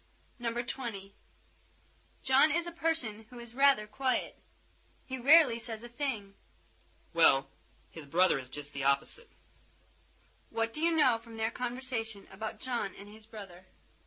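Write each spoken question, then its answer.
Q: What do you know from their conversation about John and his brother?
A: John is quiet, but his brother talks a lot.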